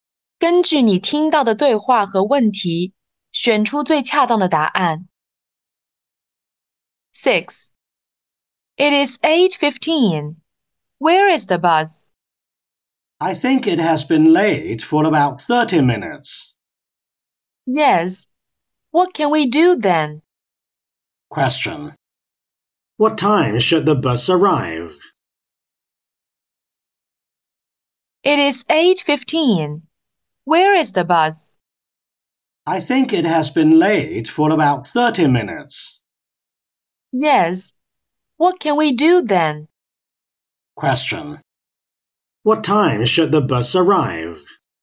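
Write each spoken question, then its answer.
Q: What time should the bus arrive?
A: At 7:45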